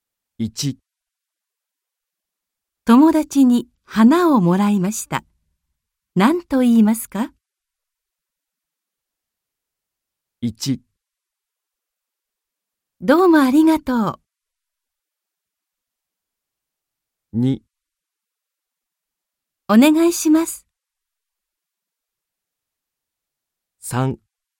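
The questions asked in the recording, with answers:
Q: 友達に花をもらいました。何と言いますか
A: 1: どうもありがとう。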